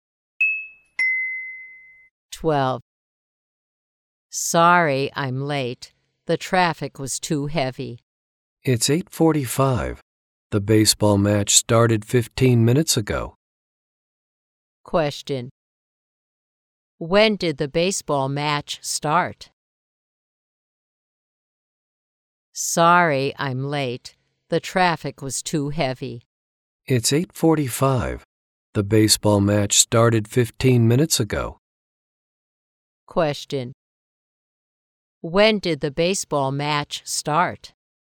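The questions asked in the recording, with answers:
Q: When did the baseball match start?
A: At 8:30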